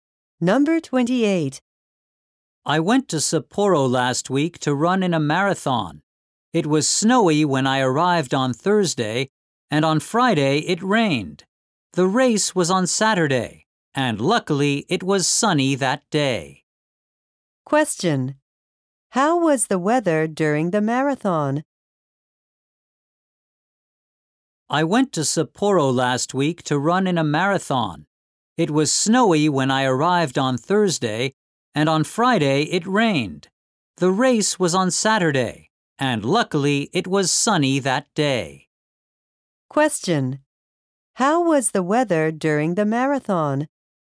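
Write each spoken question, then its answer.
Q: How was the weather during the marathon?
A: Sunny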